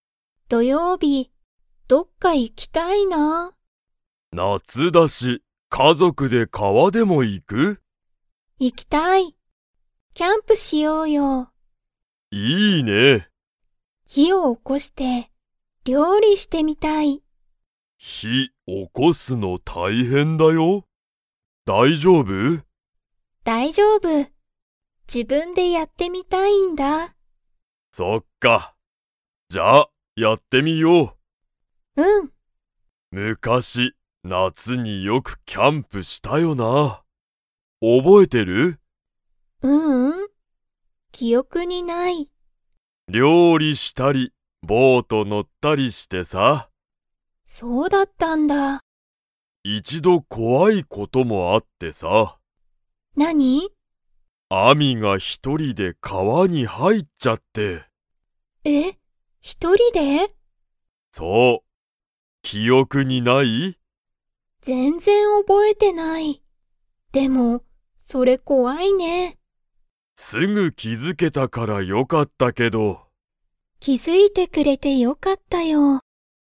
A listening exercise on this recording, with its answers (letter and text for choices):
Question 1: アミは、キャンプで何なにをしてみたいですか?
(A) 料理りょうりしてみたい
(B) ボートに乗のってみたい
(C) 本ほんを読よんでみたい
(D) 魚さかなを食たべてみたい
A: (A) 料理りょうりしてみたい

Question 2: アミは、昔むかしよくキャンプしたことを 。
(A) 覚おぼえてる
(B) 覚おぼえてない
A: (B) 覚おぼえてない

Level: Level 3